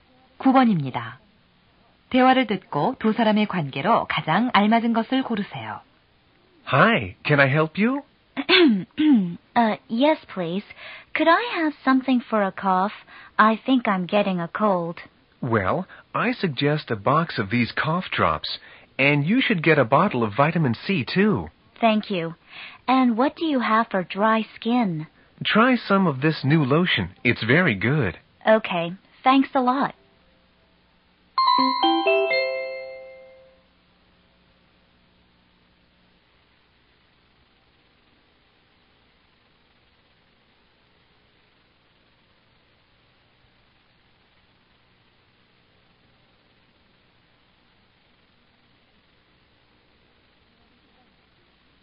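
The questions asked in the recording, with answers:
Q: 대화를 듣고 두 사람의 관계로 가장 알맞은 것을 고르세요.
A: 약사와 손님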